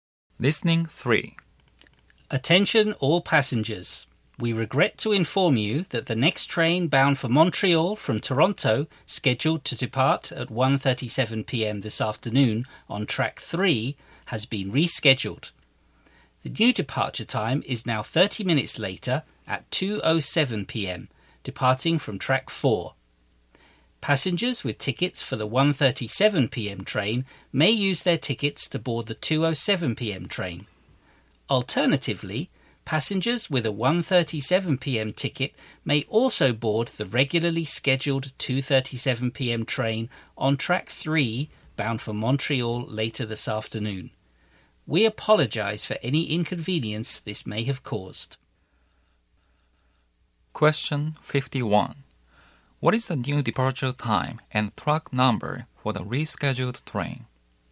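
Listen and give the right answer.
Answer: 2:07 p.m., track 4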